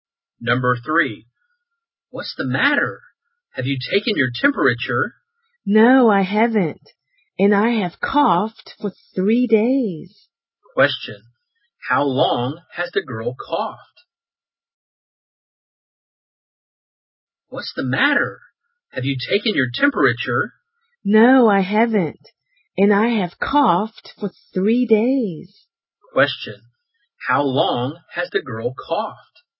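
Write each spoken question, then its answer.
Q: how long has the girl coughed?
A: For 3 days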